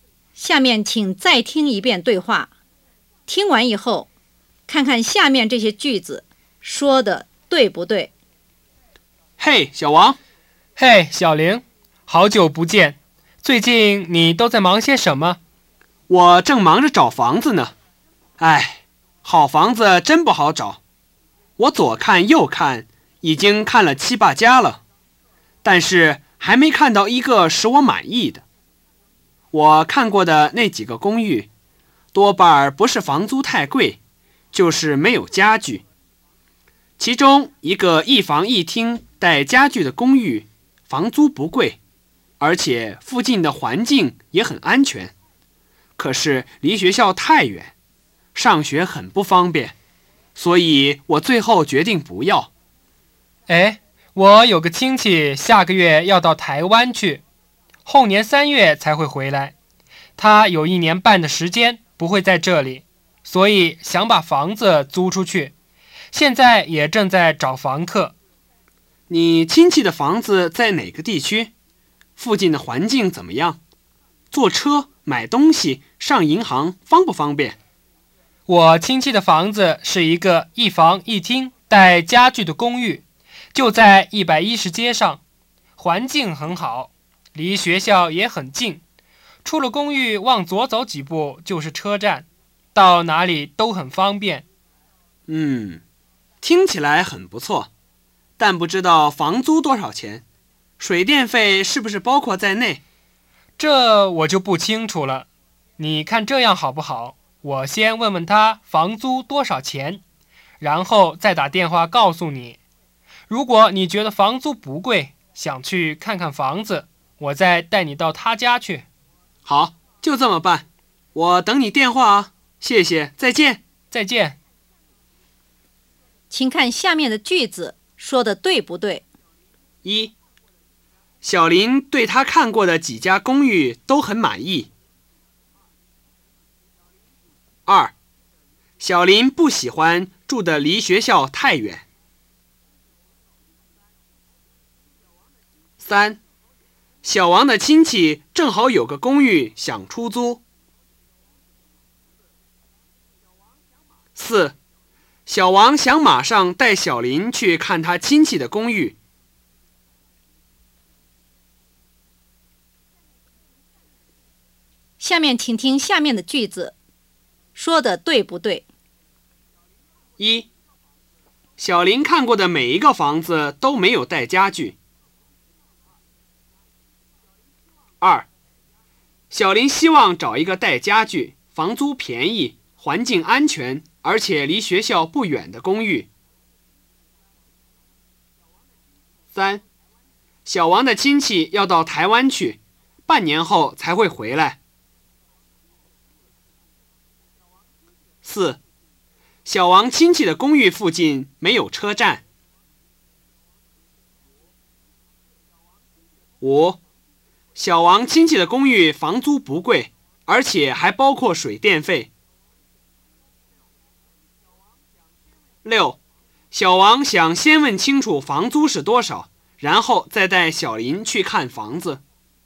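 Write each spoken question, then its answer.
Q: 小林对他看过的几家公寓都很满意。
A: 不对

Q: 小王想马上带小林去看他亲戚的公寓。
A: 不对

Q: 小林看过的每一个房子都没有带家具。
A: 不对

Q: 小王的亲戚要到台湾去,半年后才会回来。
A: 不对

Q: 小王亲戚的公寓附近没有车站。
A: 不对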